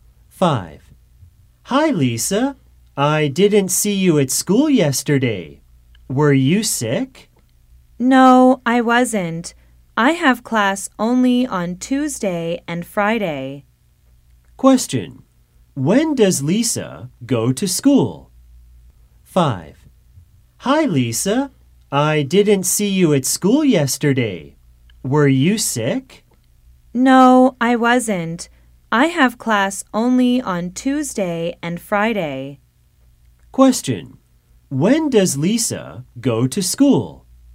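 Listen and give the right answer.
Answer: On Tuesday and Friday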